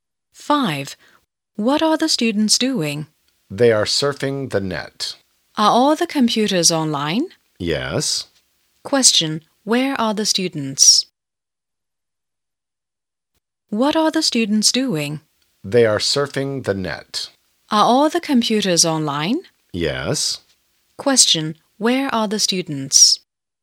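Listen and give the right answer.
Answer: In the computer room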